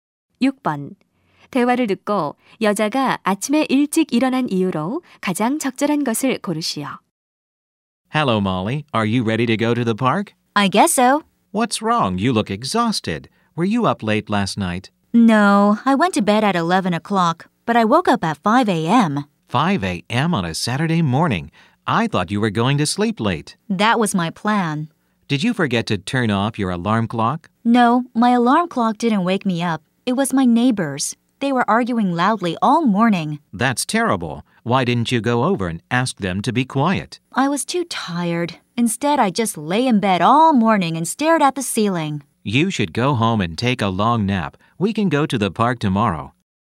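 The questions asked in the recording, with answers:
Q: 대화를 듣고 여자가 아침에 일찍 일어난 이유로 가장 적절한 것을 고르시오.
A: 이웃이 시끄럽게 다퉈서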